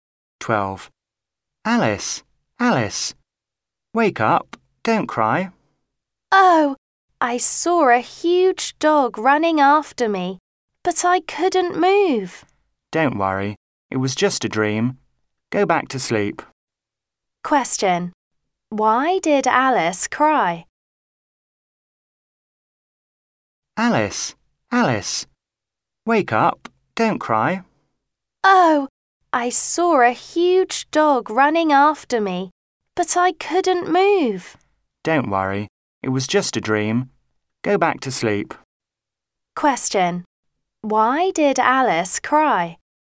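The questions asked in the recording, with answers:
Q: Why did Alice cry?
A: She had a bad dream about a huge dog chasing her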